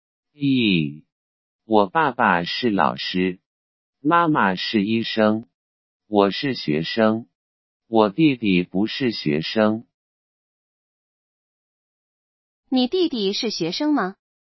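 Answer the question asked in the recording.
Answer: 不是,他不是学生。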